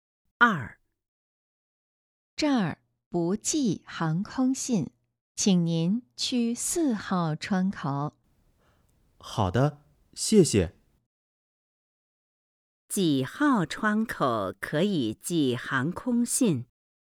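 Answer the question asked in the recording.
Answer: 四号窗口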